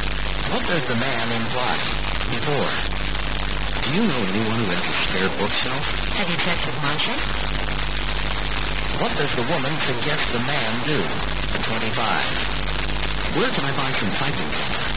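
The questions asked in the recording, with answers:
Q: What does the woman suggest the man do?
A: Ask Marcia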